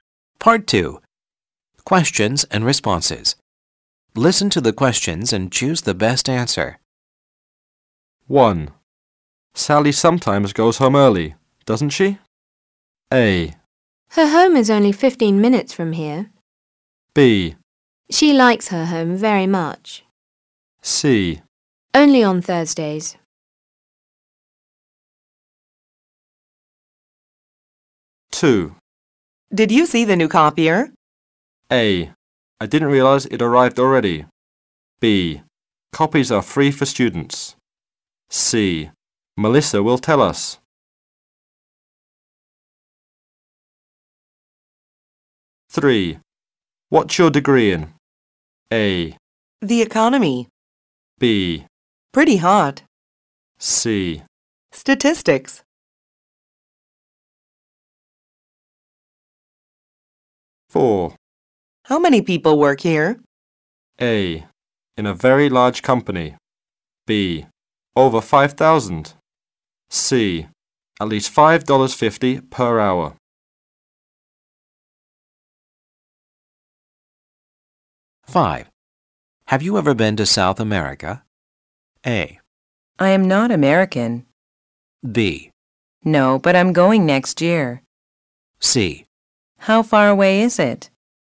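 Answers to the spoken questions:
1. C: Only on Thursdays.
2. A: I didn't realize it arrived already.
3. C: Statistics.
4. B: Over 5,000.
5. B: No, but I'm going next year.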